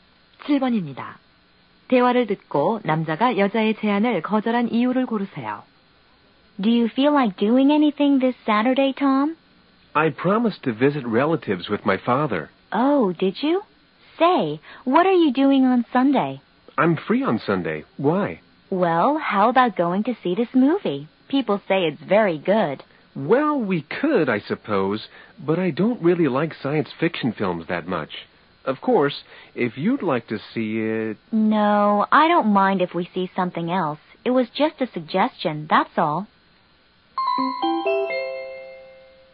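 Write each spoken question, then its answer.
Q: 대화를 듣고 남자가 여자의 제안을 거절한 이유를 고르세요.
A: 공상과학 영화를 별로 좋아하지 않아서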